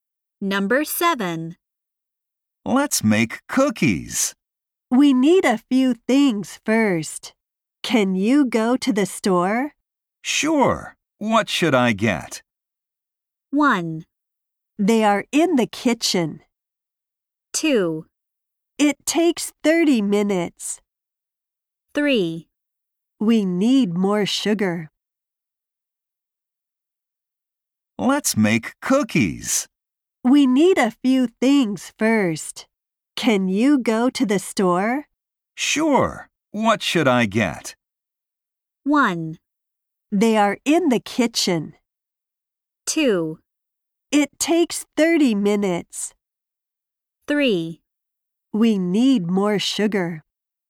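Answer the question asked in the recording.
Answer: 3: We need more sugar.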